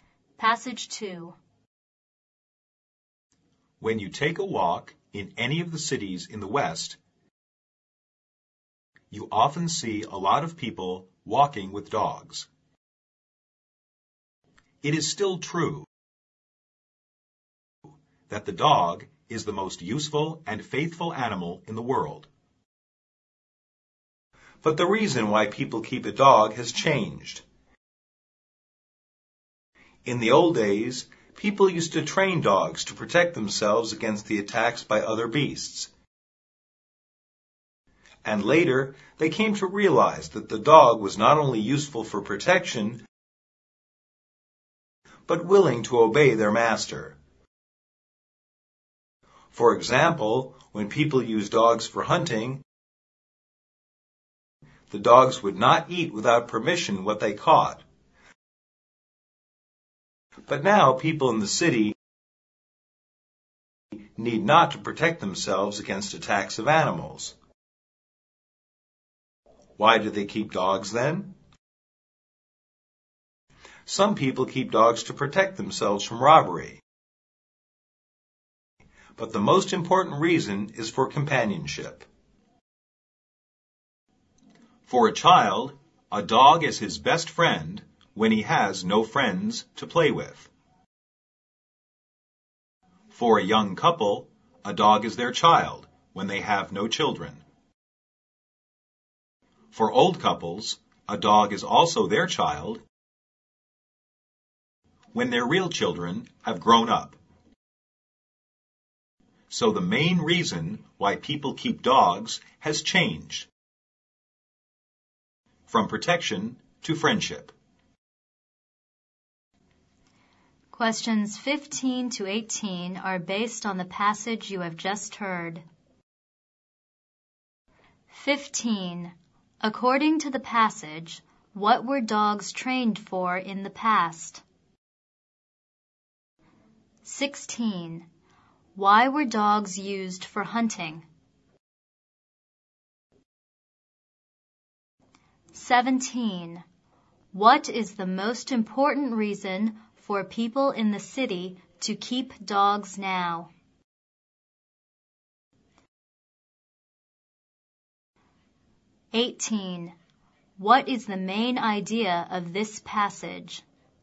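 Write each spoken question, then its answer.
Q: According to the passage, what were dogs trained for in the past?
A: To protect people against attacks by other beasts

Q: Why were dogs used for hunting?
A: They obey their master and would not eat what they caught without permission

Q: What is the most important reason for people in the city to keep dogs now?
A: For companionship

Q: What is the main idea of this passage?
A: The main reason people keep dogs has changed from protection to friendship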